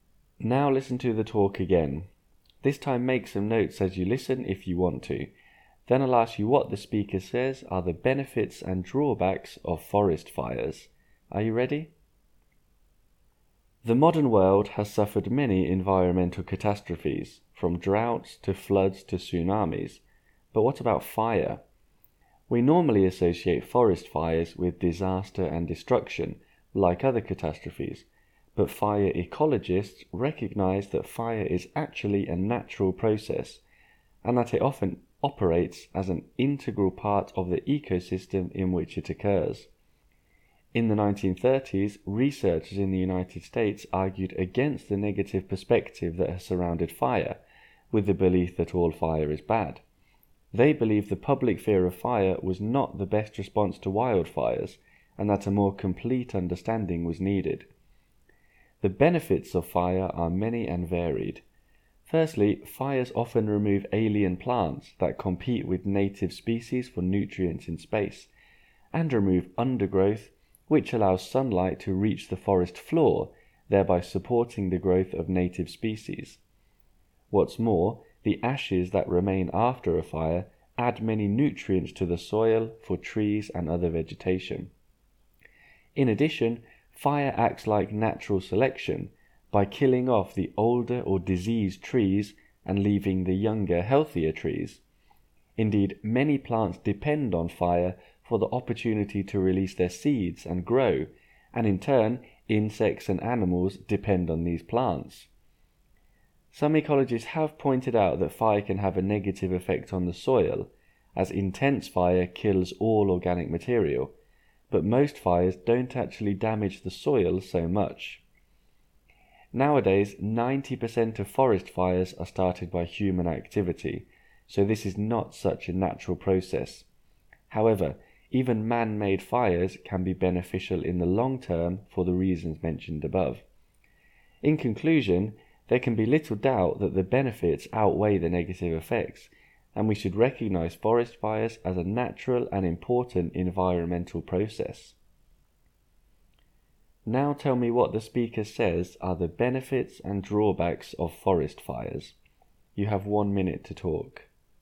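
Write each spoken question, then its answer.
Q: Now tell me what the speaker says are the benefits and drawbacks of forest fires.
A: Benefits: remove alien plants and undergrowth, ash adds nutrients to the soil, kill old or diseased trees, let plants release seeds. Drawbacks: intense fire kills organic material in the soil, and most fires are started by people.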